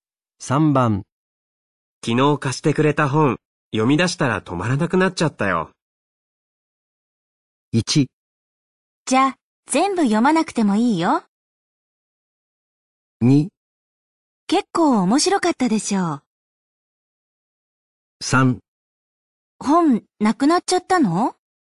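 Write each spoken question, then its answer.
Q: 昨日貸してくれた本、読み出したら止まらなくなっちゃったよ。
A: 2: 結構面白かったでしょう。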